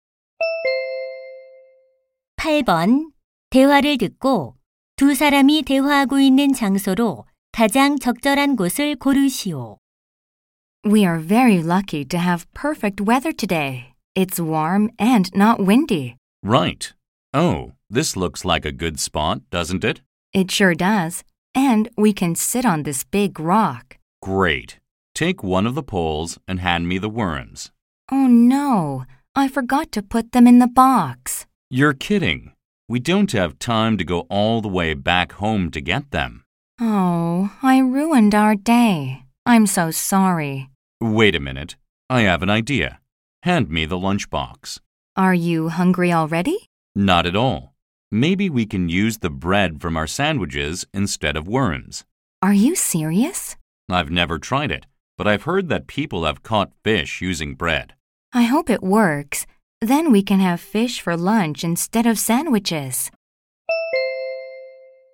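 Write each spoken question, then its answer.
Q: 대화를 듣고 두 사람이 대화하고 있는 장소로 가장 적절한 곳을 고르시오.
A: 낚시터(물가)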